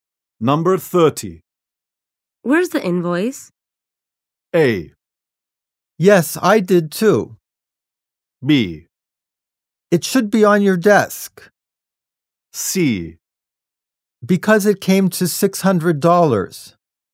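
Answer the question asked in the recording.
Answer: B: It should be on your desk.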